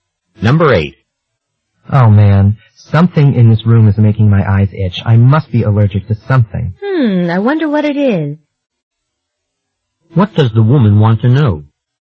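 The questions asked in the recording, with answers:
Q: What does the woman want to know?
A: What she is allergic to in the room.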